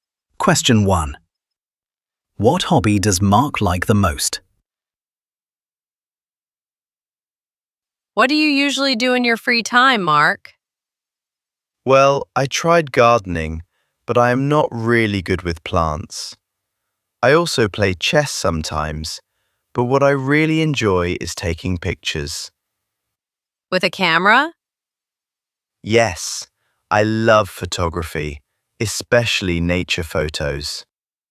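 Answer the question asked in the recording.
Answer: photography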